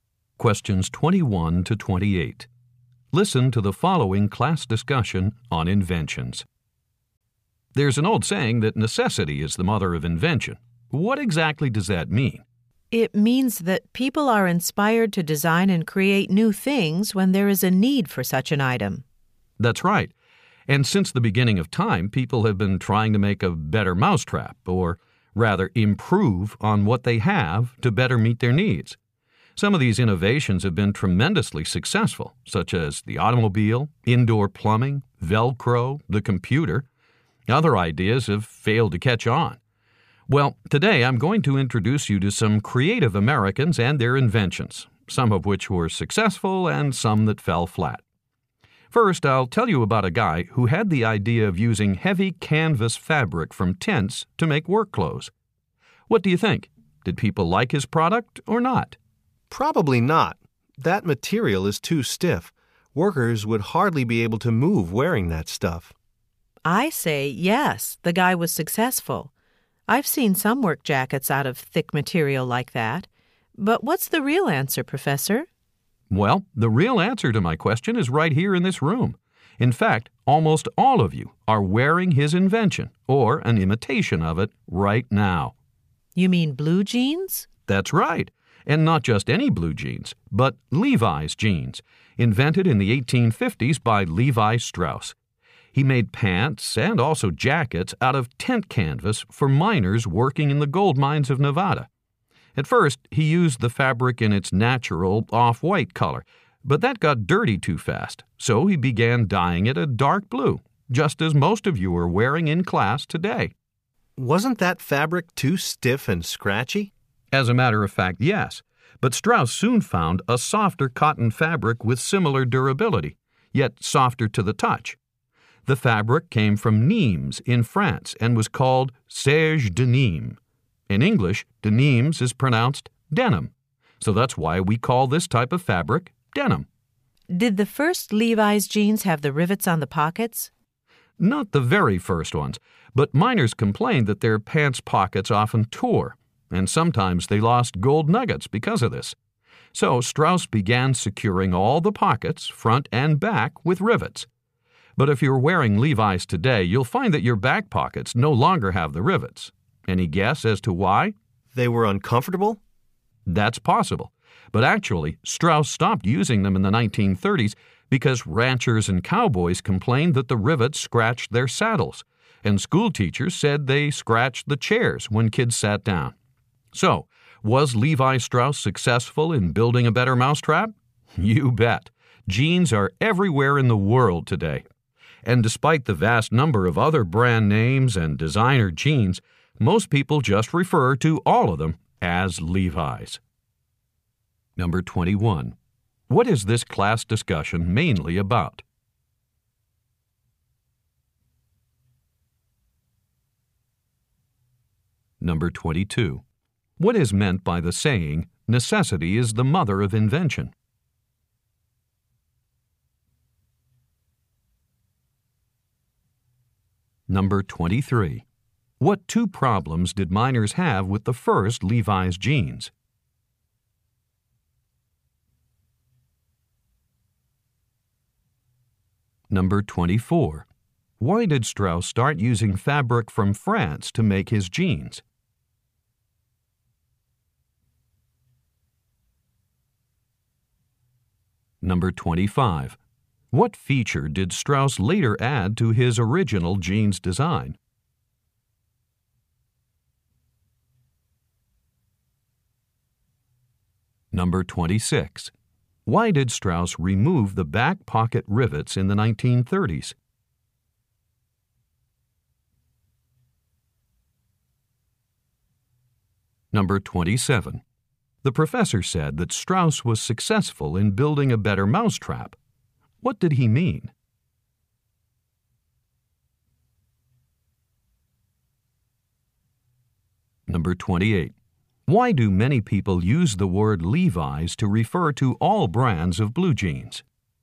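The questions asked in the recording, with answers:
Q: What is this class discussion mainly about?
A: Inventions, especially Levi Strauss's invention of blue jeans

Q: What is meant by the saying, necessity is the mother of invention?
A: People create new things when there is a need for them

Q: Why did Strauss start using fabric from France to make his jeans?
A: It was softer but just as durable

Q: What feature did Strauss later add to his original jeans design?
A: Rivets on the pockets

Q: Why did Strauss remove the back pocket rivets in the 1930s?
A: They scratched saddles and school chairs

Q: The professor said that Strauss was successful in building a better mousetrap.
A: He improved on an existing product very successfully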